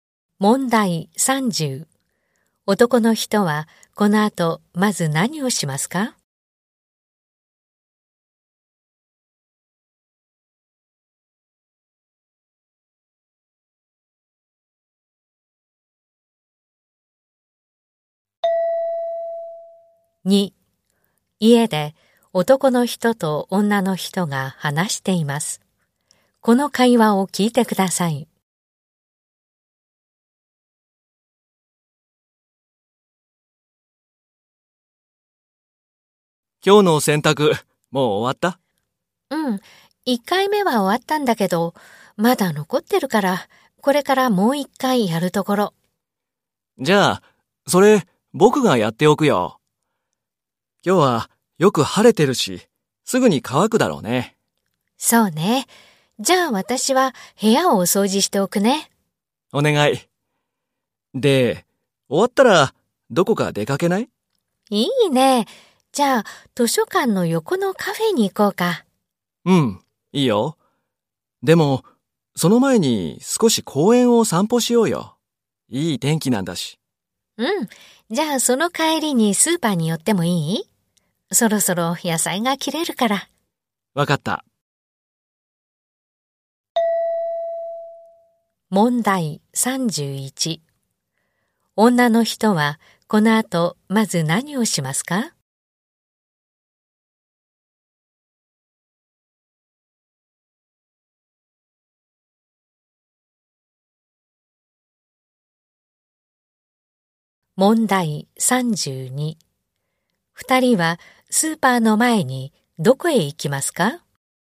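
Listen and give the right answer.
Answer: 部屋を掃除する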